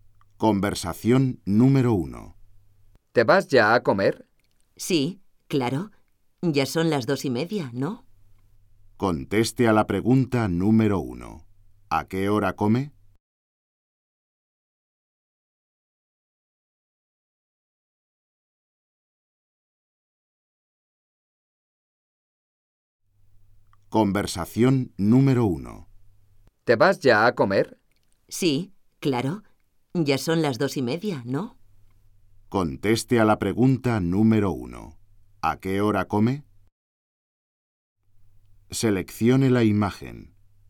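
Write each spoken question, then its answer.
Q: ¿A qué hora come?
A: A las 2:30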